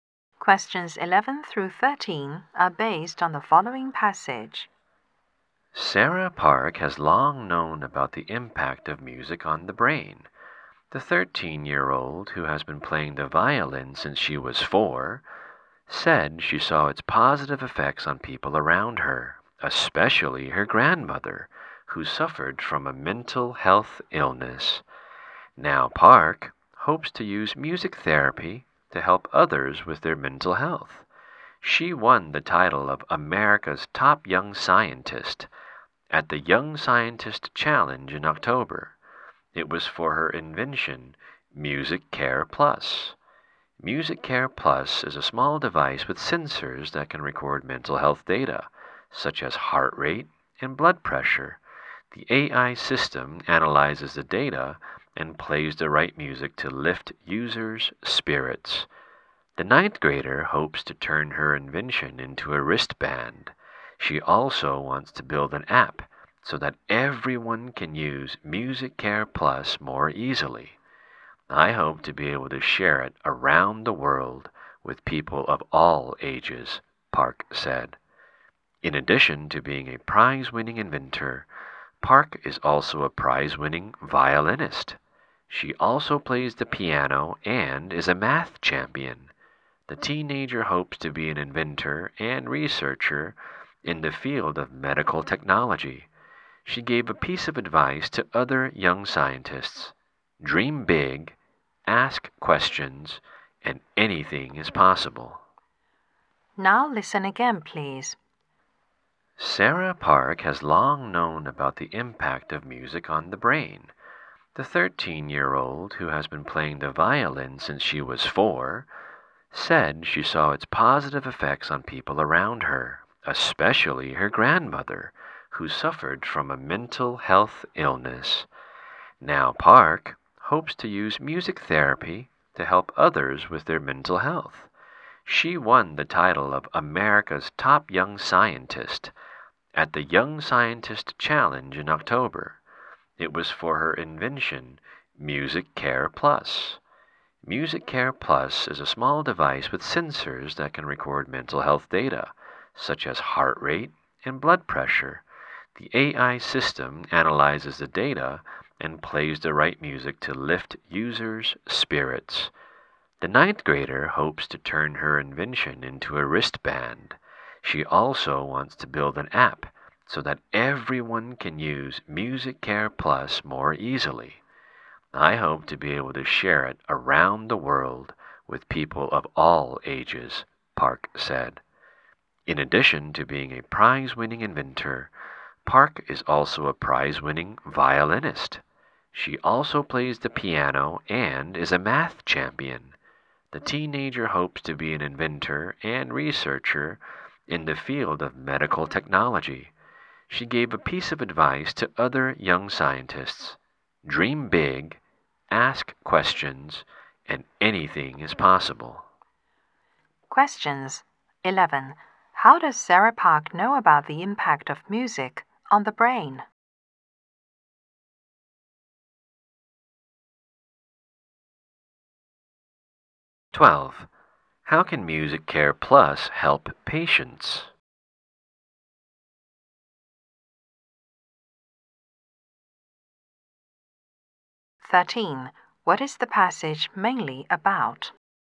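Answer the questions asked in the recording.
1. She saw its positive effects on people around her, especially her grandmother
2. It analyzes their health data and plays the right music to lift their spirits
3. A teenage inventor of a music therapy device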